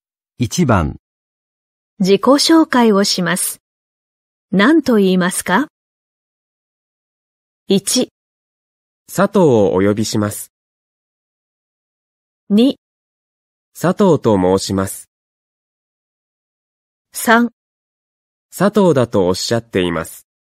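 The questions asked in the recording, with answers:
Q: 自己紹介をします。何と言いますか?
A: 2: 佐藤と申します。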